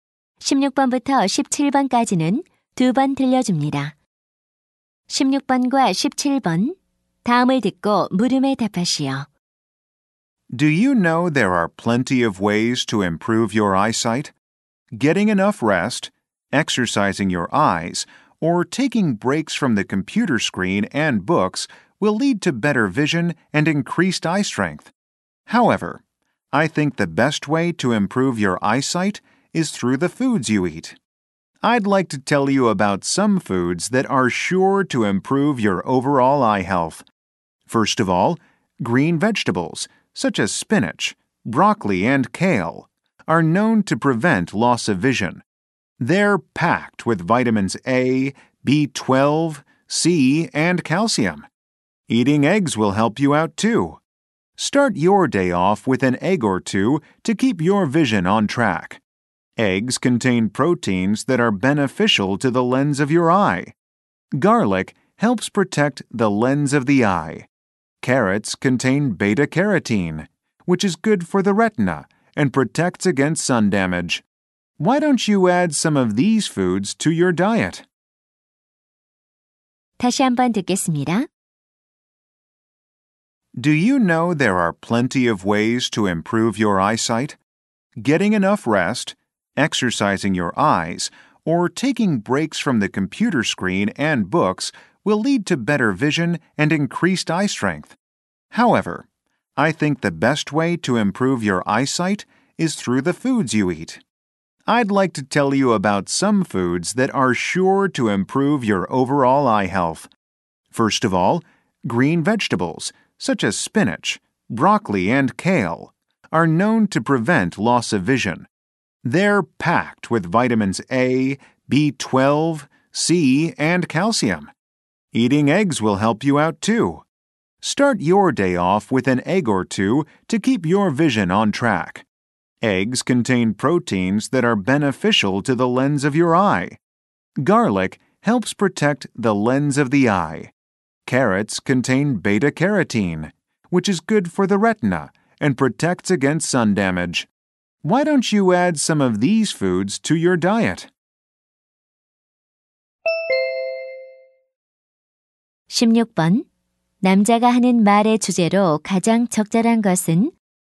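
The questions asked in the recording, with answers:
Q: 남자가 하는 말의 주제로 가장 적절한 것은?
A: 시력 개선에 도움이 되는 음식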